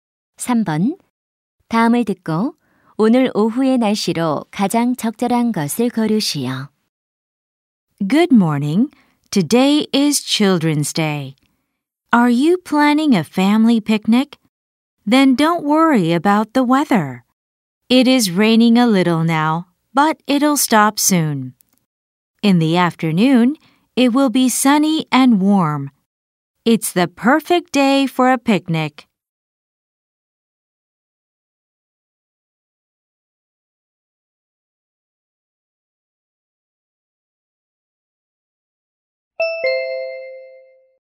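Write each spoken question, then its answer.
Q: 다음을 듣고 오늘 오후의 날씨로 가장 적절한 것을 고르시오.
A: 맑고 따뜻함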